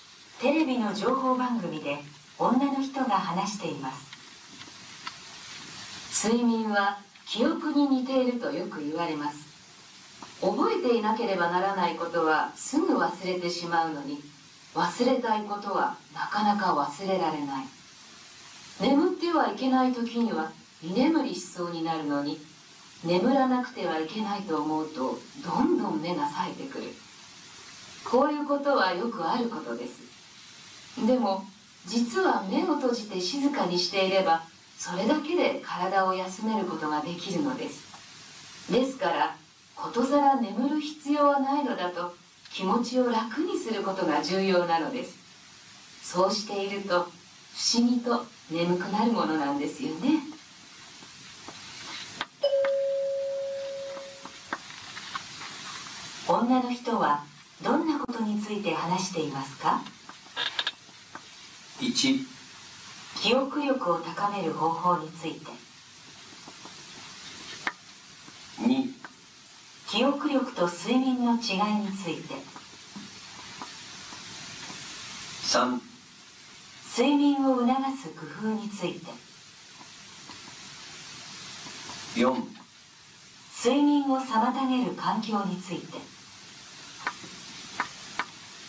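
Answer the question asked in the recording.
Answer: 3: 睡眠を促す工夫について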